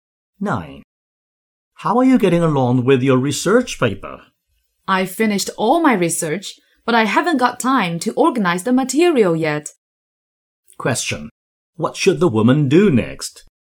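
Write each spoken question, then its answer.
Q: What should the woman do next?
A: Organize the material for her paper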